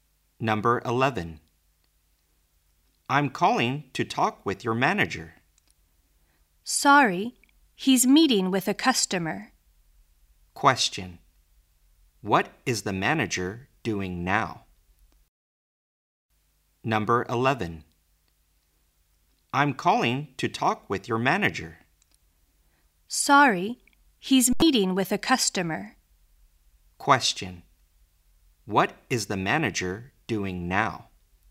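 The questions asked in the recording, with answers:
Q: What is the manager doing now?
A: Meeting with a customer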